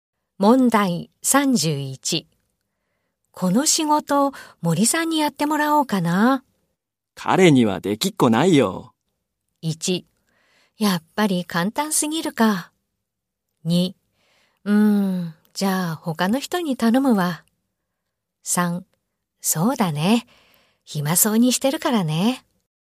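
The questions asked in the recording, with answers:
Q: この仕事、森さんにやってもらおうかな。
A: 2: じゃあ他の人に頼むわ。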